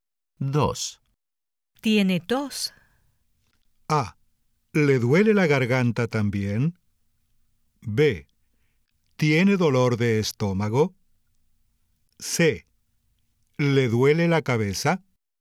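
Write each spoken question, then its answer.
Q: Tiene tos.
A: A: ¿Le duele la garganta también?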